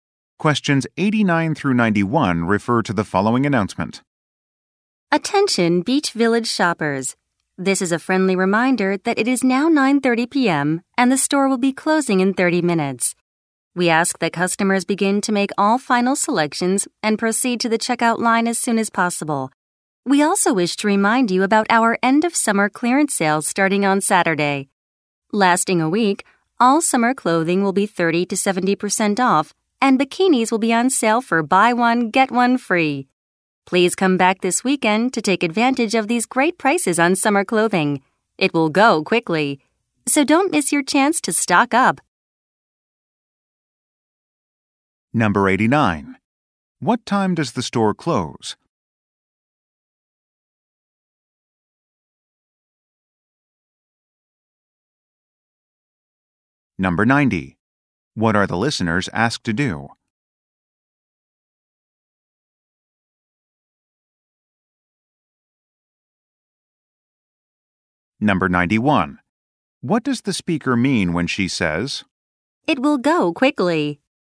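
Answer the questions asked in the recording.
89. 10:00 p.m.
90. Make final selections and go to the checkout
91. The sale items will sell out fast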